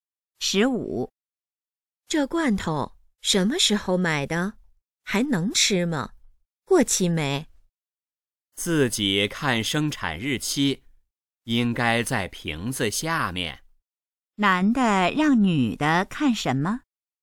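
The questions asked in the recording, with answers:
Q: 男的让女的看什么?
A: 生产日期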